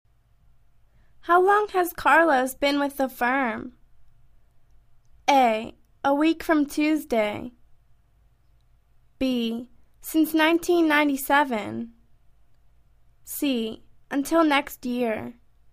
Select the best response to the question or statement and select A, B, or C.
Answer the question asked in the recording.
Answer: Since 1997.